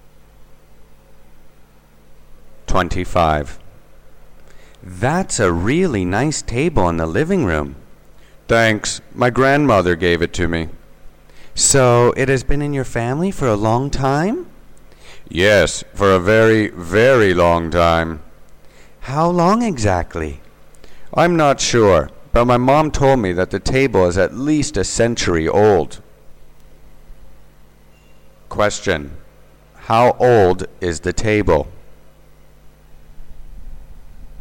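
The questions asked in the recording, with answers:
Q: How old is the table?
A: At least a century (100 years) old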